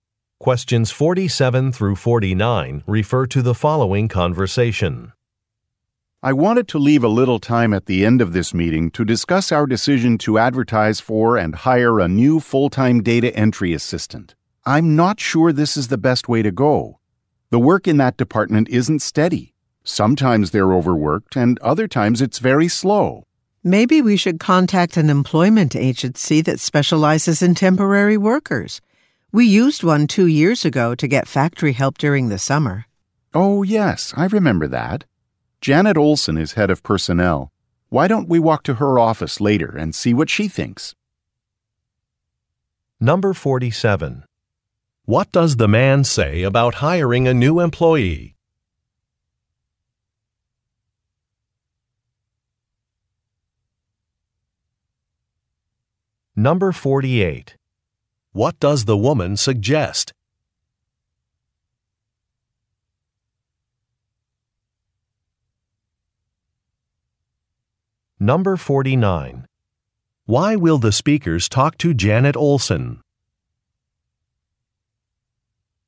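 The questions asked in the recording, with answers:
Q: What does the man say about hiring a new employee?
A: It may not be the best choice because the work isn't steady

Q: What does the woman suggest?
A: Contacting a temporary employment agency

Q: Why will the speakers talk to Janet Olson?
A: To get her opinion as head of personnel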